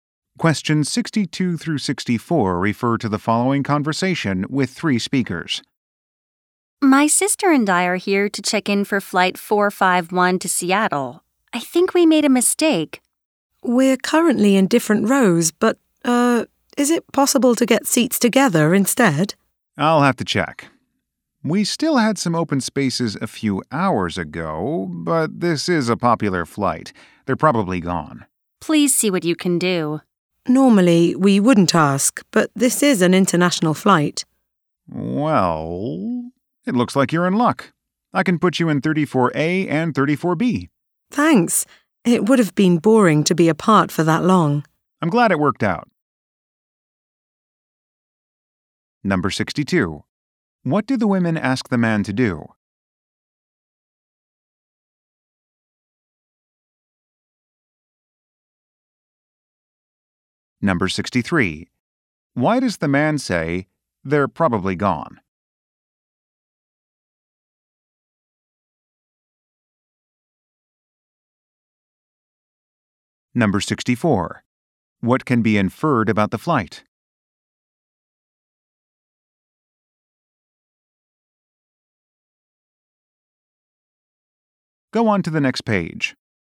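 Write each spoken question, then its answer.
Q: What do the women ask the man to do?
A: Seat them together

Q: Why does the man say, "They're probably gone"?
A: The open seats were likely taken because it's a popular flight

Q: What can be inferred about the flight?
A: It is a long international flight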